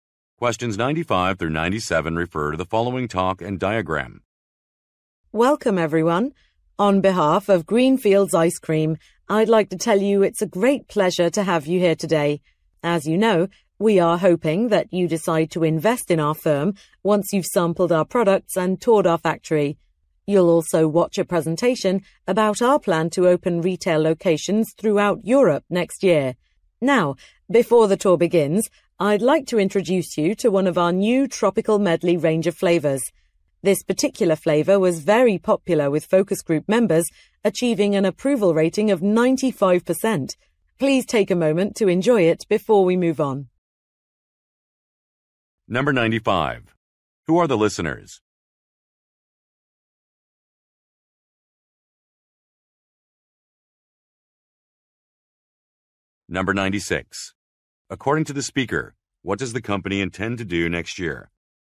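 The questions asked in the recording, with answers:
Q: Who are the listeners?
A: Potential investors.

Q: According to the speaker, what does the company intend to do next year?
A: Open retail locations throughout Europe.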